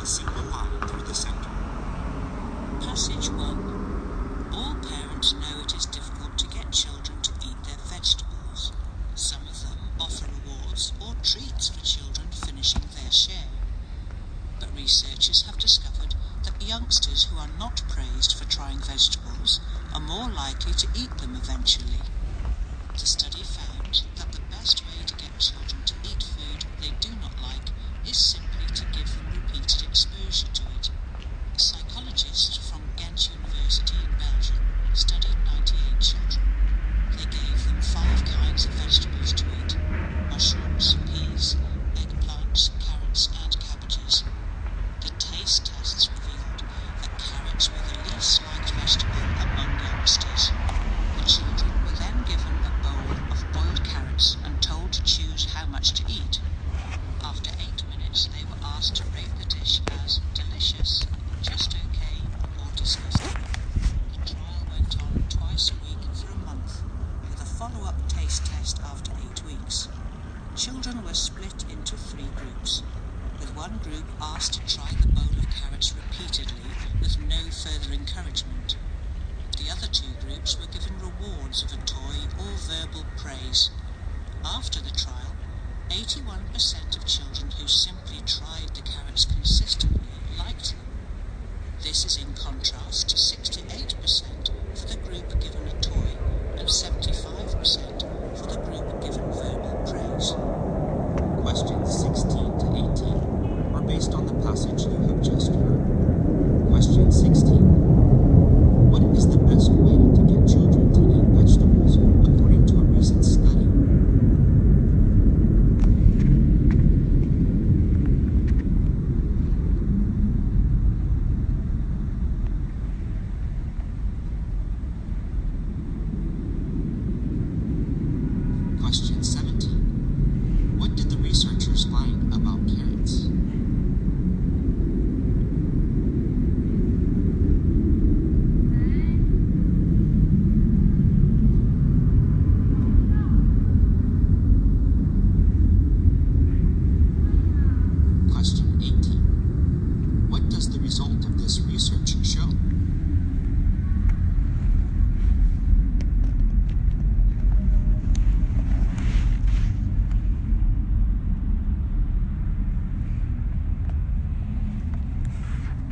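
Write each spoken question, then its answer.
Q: What is the best way to get children to eat vegetables according to a recent study?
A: Give them repeated exposure to the vegetables.

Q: What did the researchers find about carrots?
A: Carrots were the vegetable children liked least.

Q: What does the result of this research show?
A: Children who weren't rewarded were more likely to come to like the vegetable.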